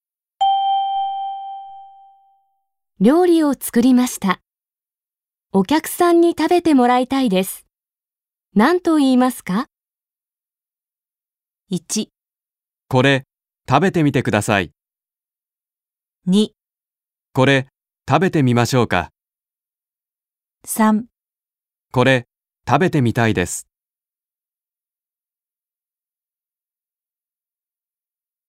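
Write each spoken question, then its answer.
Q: 料理を作りました。お客さんに食べてもらいたいです。何と言いますか ?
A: 1: これ、食べてみてください。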